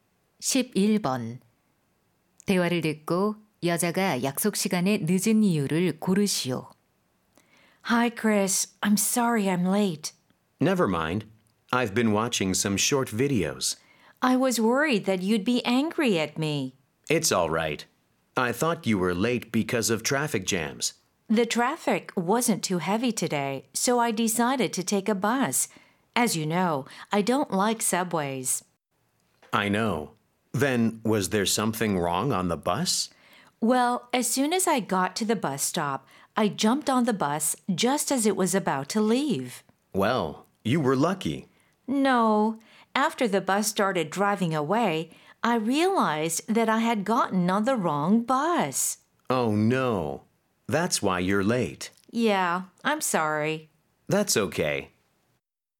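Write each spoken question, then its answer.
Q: 대화를 듣고 여자가 약속 시간에 늦은 이유를 고르시오.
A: 버스를 잘못 타서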